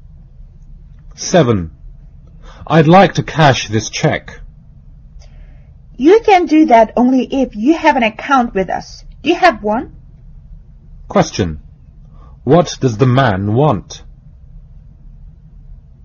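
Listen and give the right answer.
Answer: To cash a check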